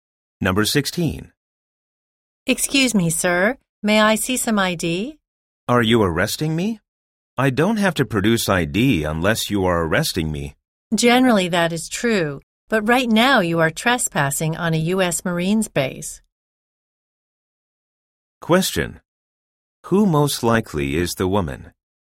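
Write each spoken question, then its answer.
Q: Who most likely is the woman?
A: A security officer at a U.S. Marines base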